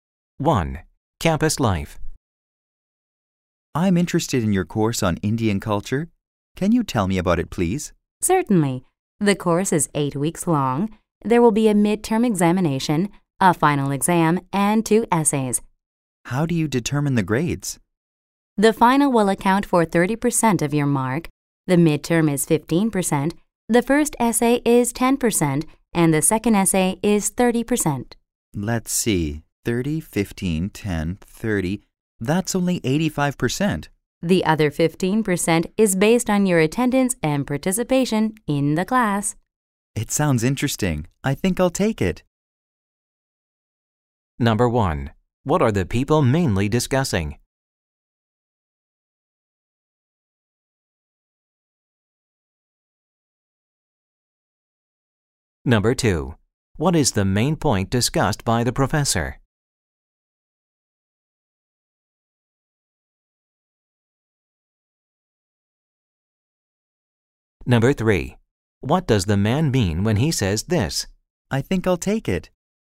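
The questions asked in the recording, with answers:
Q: What are the people mainly discussing?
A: A course on Indian culture

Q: What is the main point discussed by the professor?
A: How grades in the course are determined

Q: What does the man mean when he says this?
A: He will sign up for the course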